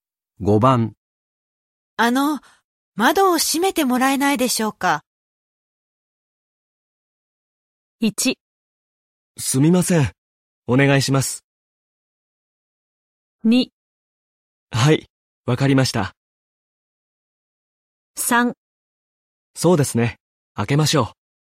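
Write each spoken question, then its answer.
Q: 窓を閉めてもらえないでしょうか?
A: 2: はい、わかりました。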